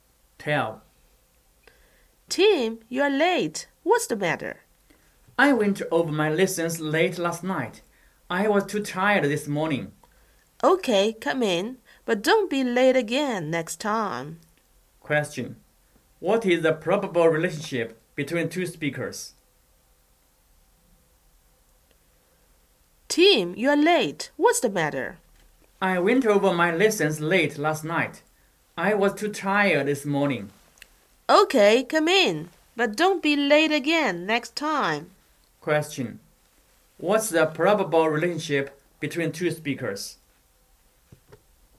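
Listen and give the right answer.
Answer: Teacher and student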